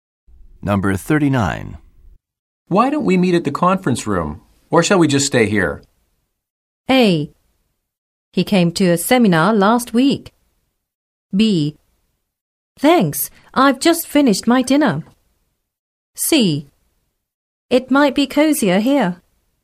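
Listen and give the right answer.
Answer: C: It might be cozier here.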